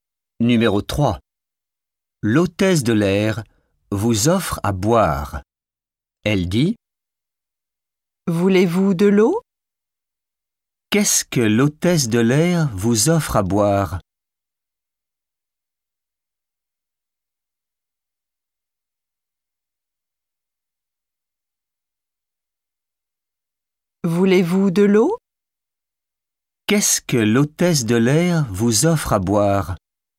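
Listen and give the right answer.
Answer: De l'eau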